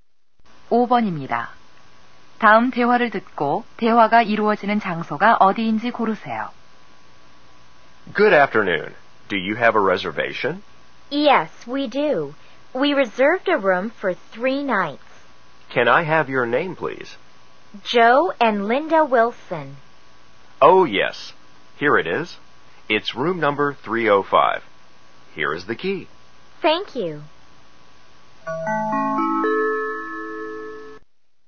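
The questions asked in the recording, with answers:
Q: 다음 대화를 듣고 대화가 이루어지는 장소가 어디인지 고르세요.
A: 호텔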